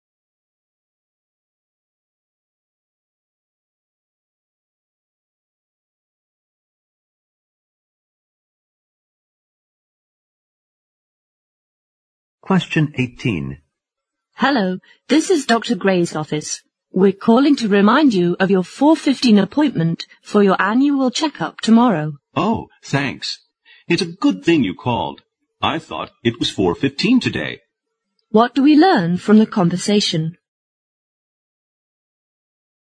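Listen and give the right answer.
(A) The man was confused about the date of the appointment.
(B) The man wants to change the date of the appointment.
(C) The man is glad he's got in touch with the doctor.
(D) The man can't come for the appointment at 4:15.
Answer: (A) The man was confused about the date of the appointment.

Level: 四级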